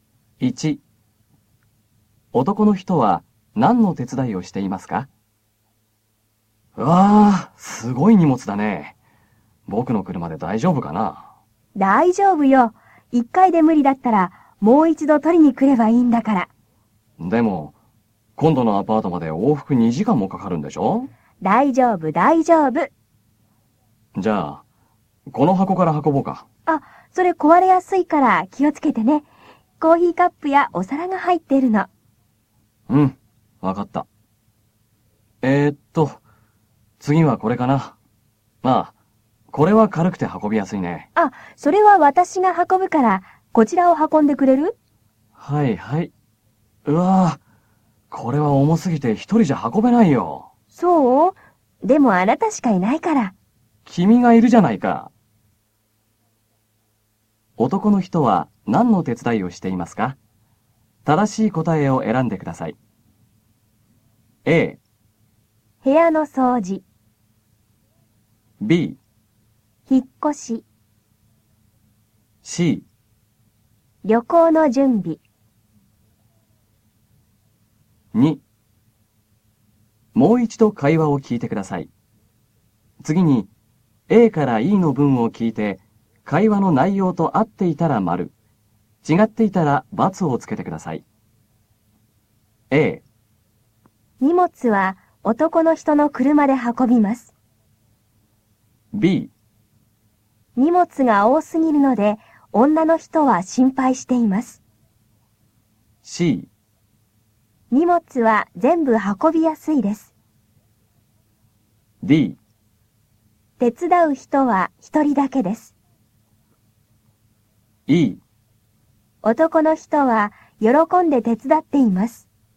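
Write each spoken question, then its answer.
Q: 男の人は何の手伝いをしていますか?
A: B: 引っ越し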